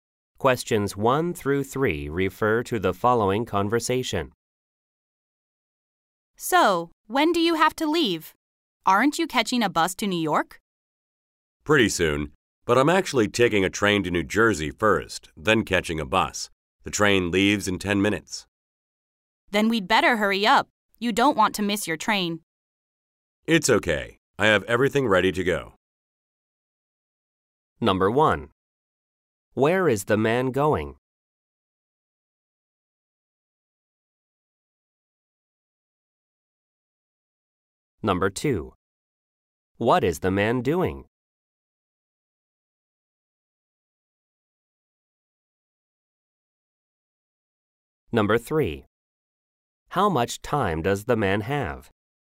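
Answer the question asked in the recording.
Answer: New York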